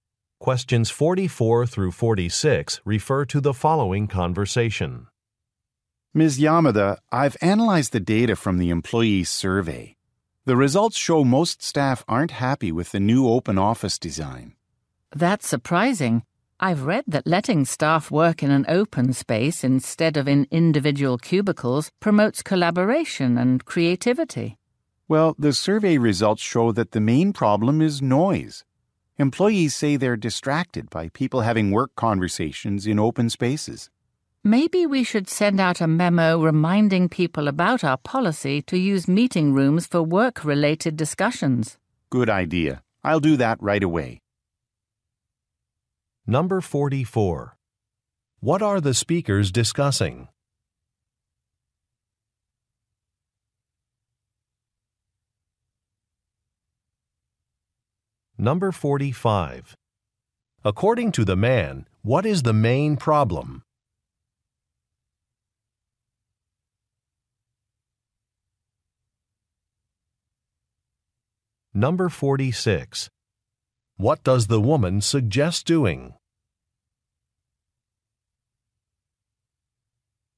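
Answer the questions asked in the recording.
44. Employee survey results about the open office design
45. Noise
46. Sending a memo reminding staff to use meeting rooms for work discussions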